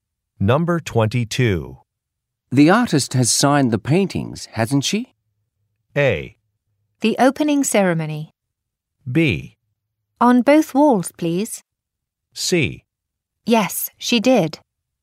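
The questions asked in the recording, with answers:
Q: The artist has signed the paintings, hasn't she?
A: C: Yes, she did.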